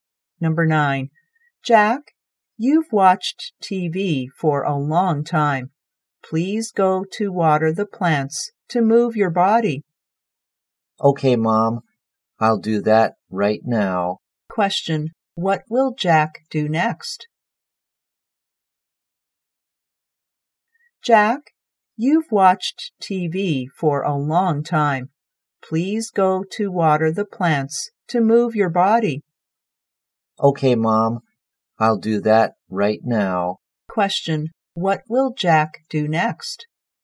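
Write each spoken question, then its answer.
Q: Question. What will Jack do next?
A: Water the plants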